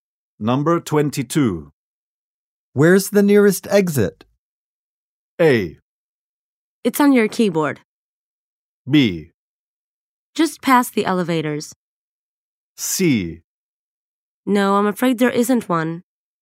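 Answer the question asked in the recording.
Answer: B: Just past the elevators.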